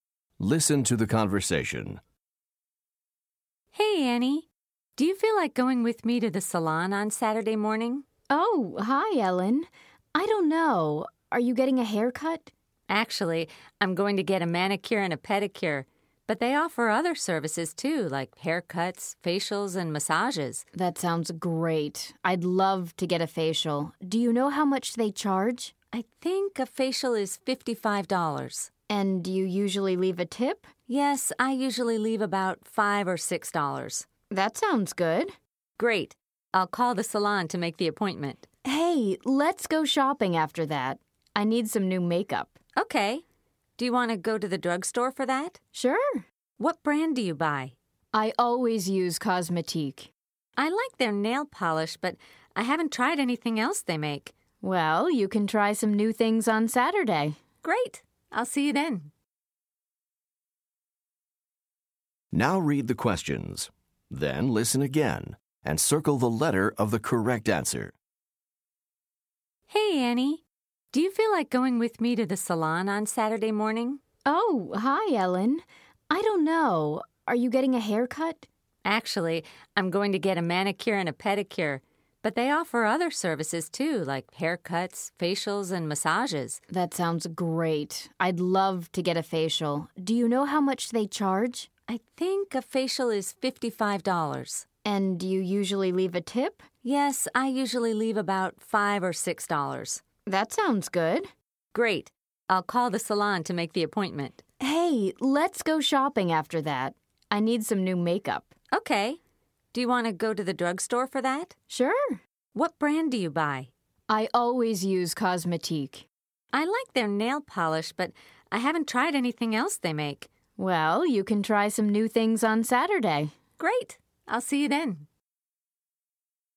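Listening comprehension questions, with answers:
Listen to the conversation. Then choose the correct answer for each question.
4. Which salon service is Ellen going to get?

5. Which salon service does Annie want?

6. How much does a facial cost at the salon?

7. What is Cosmetique?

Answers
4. a manicure and a pedicure
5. a facial
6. $55
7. a makeup brand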